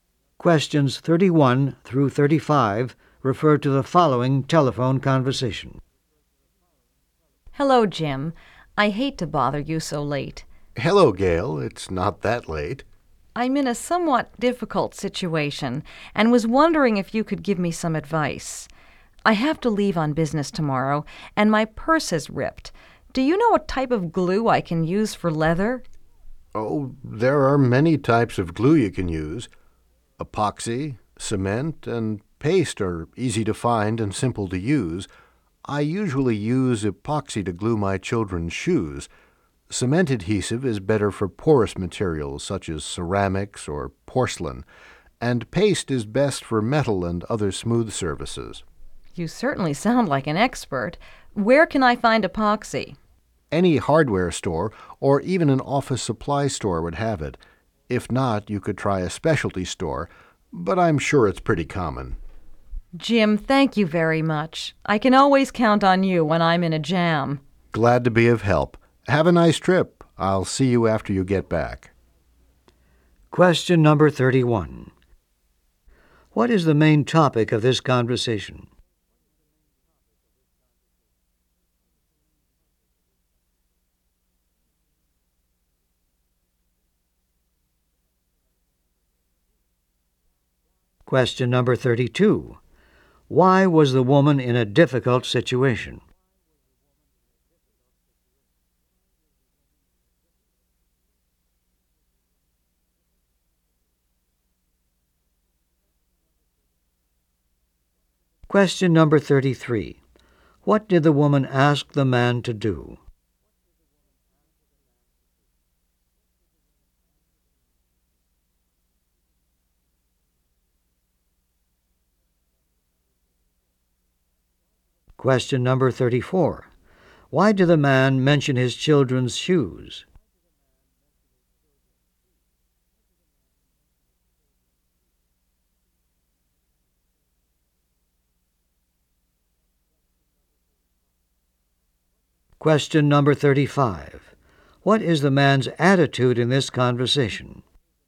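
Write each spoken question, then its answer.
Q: What is the main topic of this conversation?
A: Which glue to use to repair a leather purse

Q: Why was the woman in a difficult situation?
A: Her purse was ripped and she leaves on business tomorrow

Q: What did the woman ask the man to do?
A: Give her advice about glue for leather

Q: Why did the man mention his children's shoes?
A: He uses epoxy to glue them, so it works on leather

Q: What is the man's attitude in this conversation?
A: Helpful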